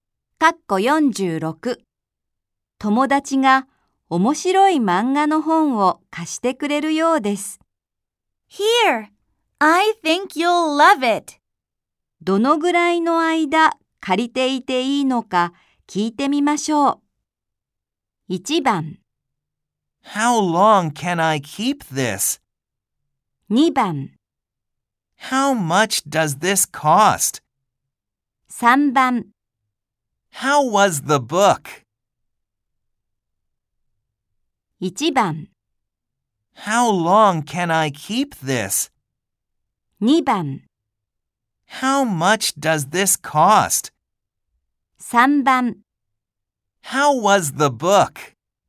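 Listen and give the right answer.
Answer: 1: How long can I keep this?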